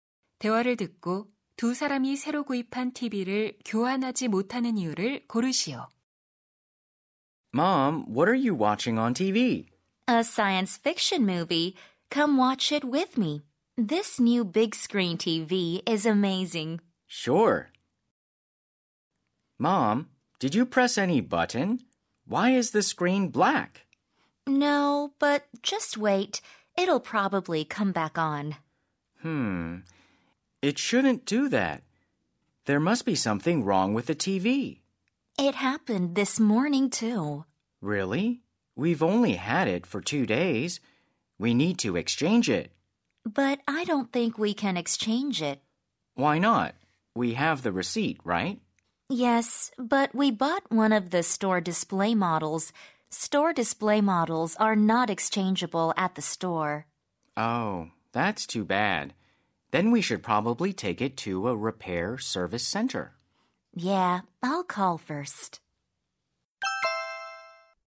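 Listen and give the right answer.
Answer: 매장 전시 상품을 샀기 때문에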